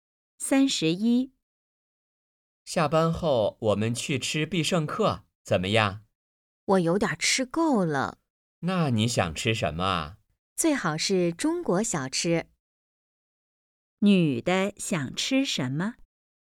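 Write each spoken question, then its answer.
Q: 女的想吃什么?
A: 中国小吃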